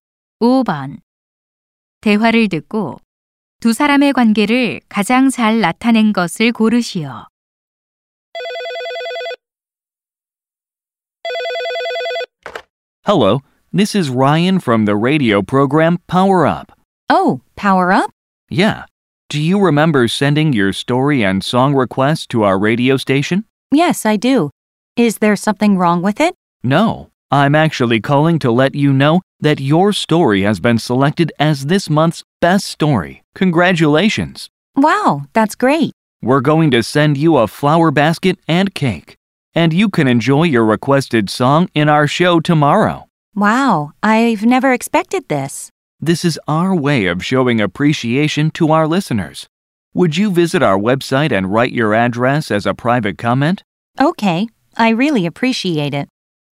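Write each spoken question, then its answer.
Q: 대화를 듣고 두 사람의 관계를 가장 잘 나타낸 것을 고르시오.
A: 라디오 진행자와 청취자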